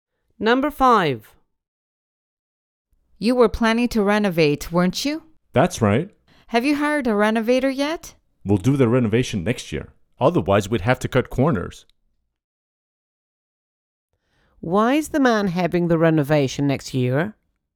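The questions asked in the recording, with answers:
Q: Why is the man having the renovation next year?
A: Otherwise they would have to cut corners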